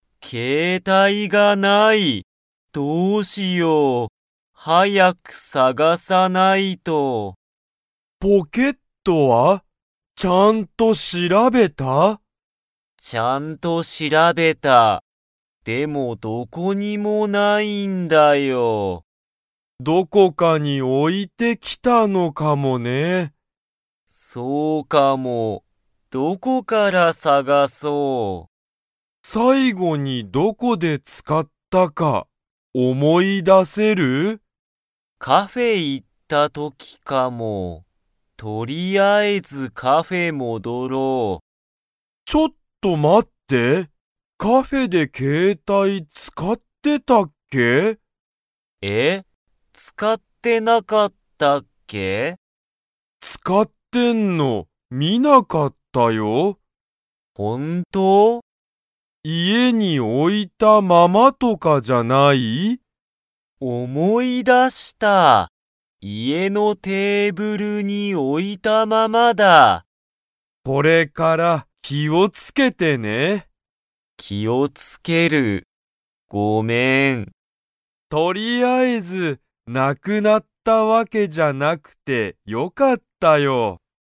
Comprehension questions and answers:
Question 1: ケントは、ポケットをちゃんと 。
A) 調しらべた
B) 調しらべていない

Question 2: 携帯けいたいはどこに置おいたままでしたか?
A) カフェ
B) 学校がっこう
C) ケントの家いえ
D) ユウヤの家いえ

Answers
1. A
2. C

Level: Level 3

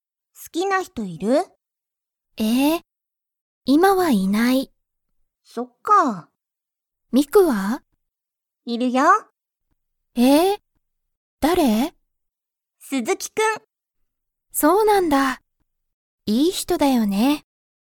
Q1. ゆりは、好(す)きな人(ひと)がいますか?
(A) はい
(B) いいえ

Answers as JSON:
{"1": "B"}

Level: Level 1

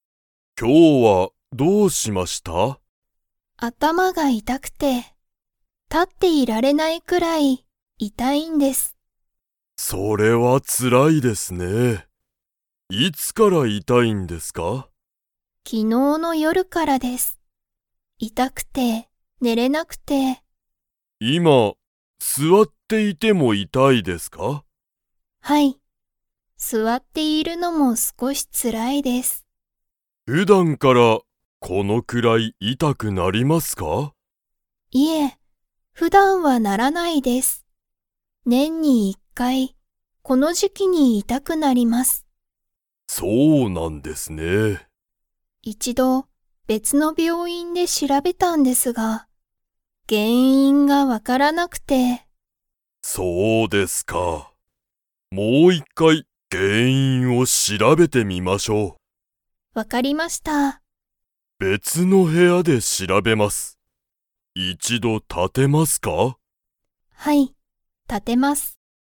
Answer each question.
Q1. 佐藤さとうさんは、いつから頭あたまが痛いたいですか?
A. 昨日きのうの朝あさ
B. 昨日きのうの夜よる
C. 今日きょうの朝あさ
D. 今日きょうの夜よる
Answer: B

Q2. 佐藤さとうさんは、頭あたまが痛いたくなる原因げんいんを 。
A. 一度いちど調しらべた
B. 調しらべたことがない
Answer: A

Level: Level 3

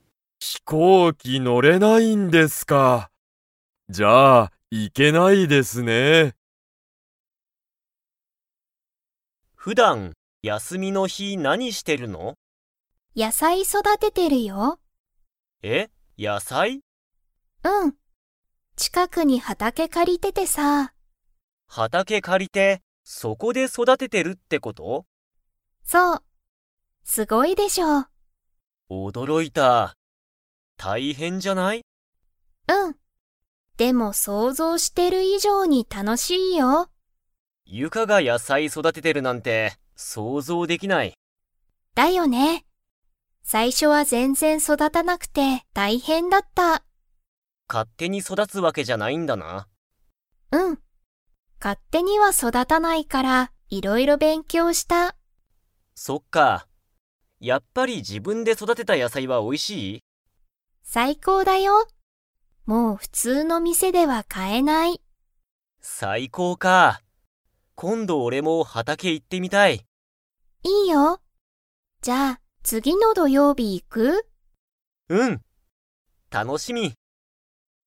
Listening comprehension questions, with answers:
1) ユカは何なにを育そだててますか?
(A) 車くるま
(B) 動物どうぶつ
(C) 魚さかな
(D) 野菜やさい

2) 次つぎの土曜日どようび、ケンは畑はたけに 。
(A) 行いく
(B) 行いかない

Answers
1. D
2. A

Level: Level 4

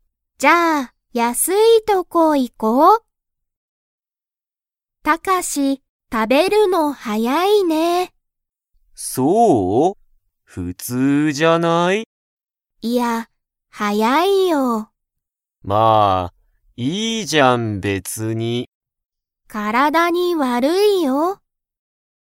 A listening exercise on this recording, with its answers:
Comprehension Quiz (Skip if you don't understand the conversation yet)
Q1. タカシは食(た)べるのが____。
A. はやい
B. 高(たか)い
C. おいしい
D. 大(おお)きい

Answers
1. A

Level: Level 1

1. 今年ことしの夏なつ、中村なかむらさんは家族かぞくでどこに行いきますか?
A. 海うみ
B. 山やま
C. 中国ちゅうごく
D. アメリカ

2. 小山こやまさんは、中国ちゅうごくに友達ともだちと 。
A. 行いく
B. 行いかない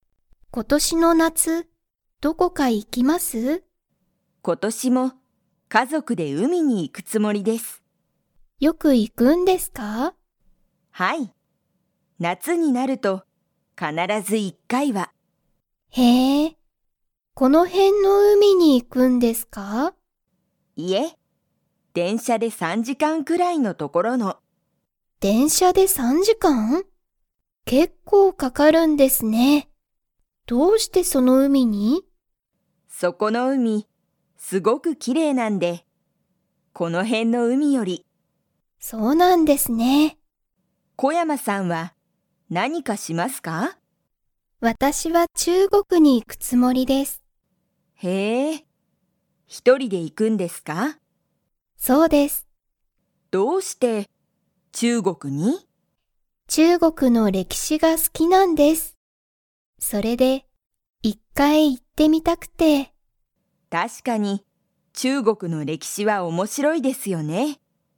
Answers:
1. A
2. B

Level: Level 3

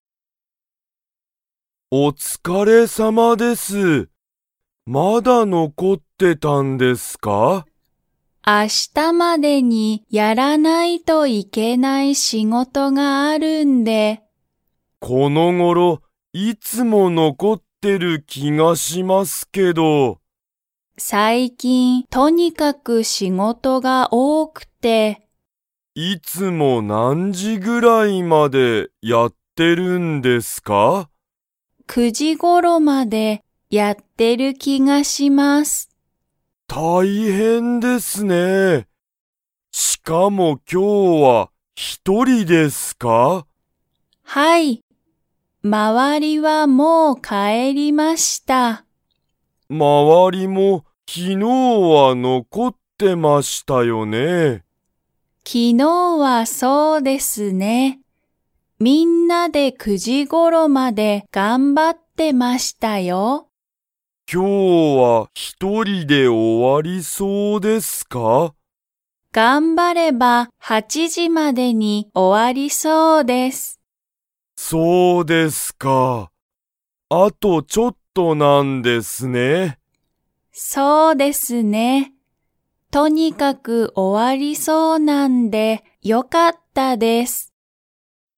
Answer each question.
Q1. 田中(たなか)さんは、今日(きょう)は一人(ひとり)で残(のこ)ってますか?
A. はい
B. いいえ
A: A

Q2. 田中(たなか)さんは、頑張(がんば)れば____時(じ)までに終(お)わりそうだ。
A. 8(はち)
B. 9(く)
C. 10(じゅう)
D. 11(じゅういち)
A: A

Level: Level 2

